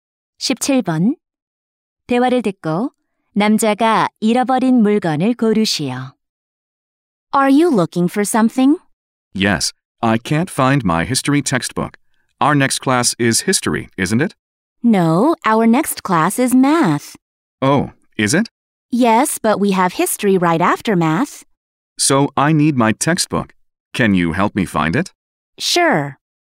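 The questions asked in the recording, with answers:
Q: 대화를 듣고 남자가 잃어버린 물건을 고르시오.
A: 역사 교과서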